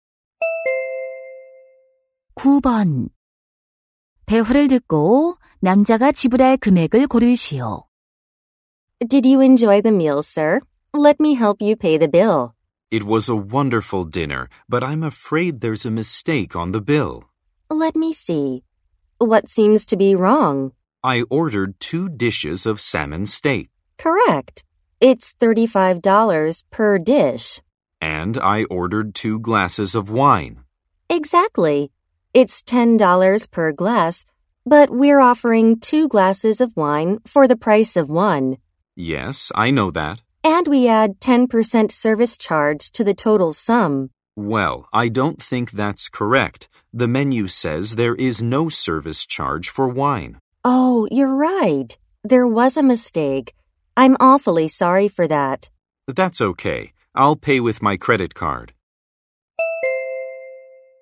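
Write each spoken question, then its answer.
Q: 대화를 듣고 남자가 지불할 금액을 고르시오.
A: 87달러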